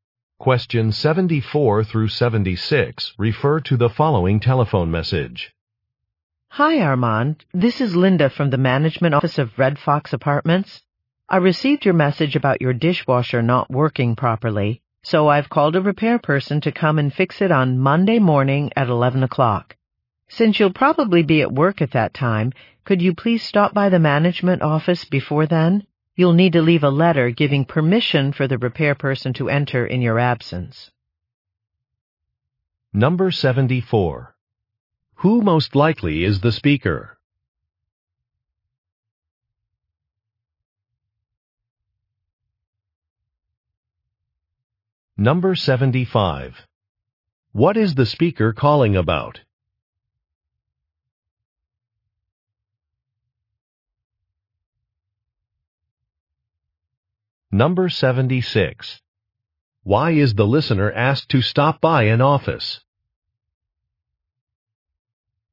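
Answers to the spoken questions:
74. An apartment building office manager
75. A repair for a dishwasher
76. To leave a letter giving the repair person permission to enter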